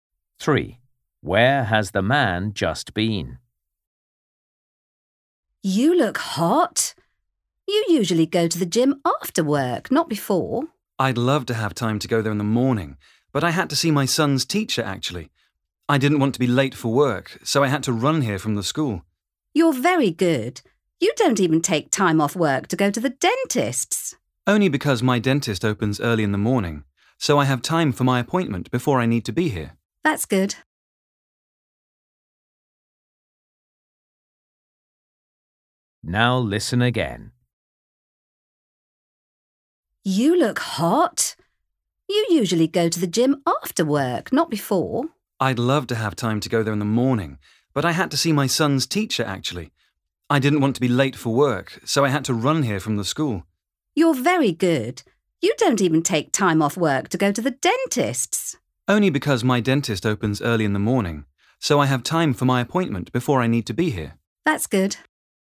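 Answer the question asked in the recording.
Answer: his son's school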